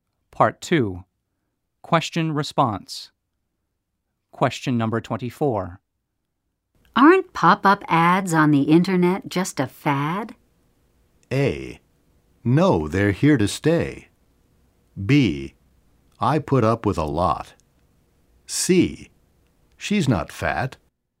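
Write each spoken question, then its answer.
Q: Aren't pop-up ads on the internet just a fad?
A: A: No, they're here to stay.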